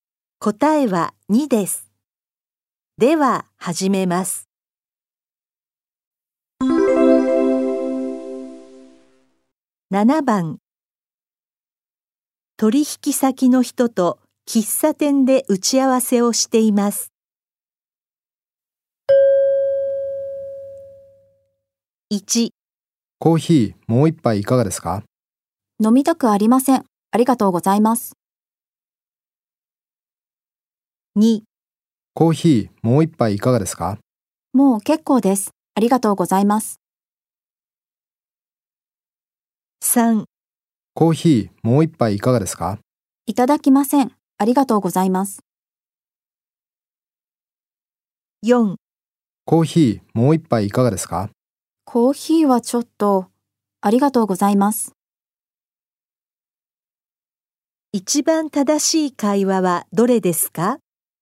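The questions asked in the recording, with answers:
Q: 一番正しい会話はどれですか?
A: 2: もう結構です。ありがとうございます。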